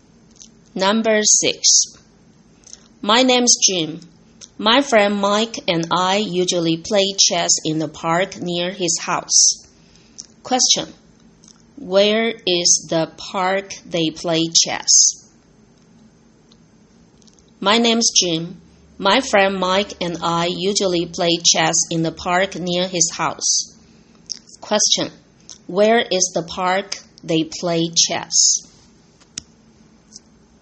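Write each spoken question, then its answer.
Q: Where is the park they play chess?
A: Near Mike's house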